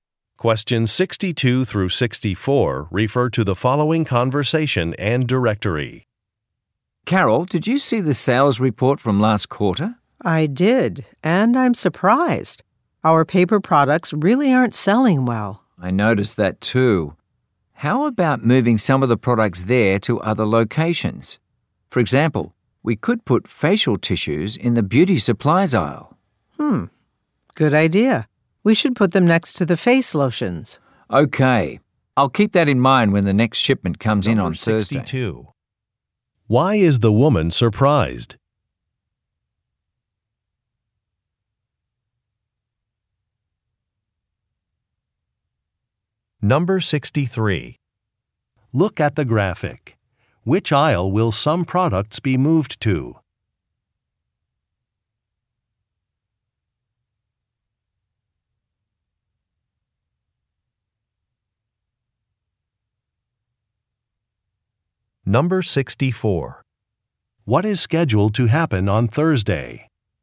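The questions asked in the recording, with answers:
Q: Why is the woman surprised?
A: Paper products aren't selling well.

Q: What is scheduled to happen on Thursday?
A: A shipment will arrive.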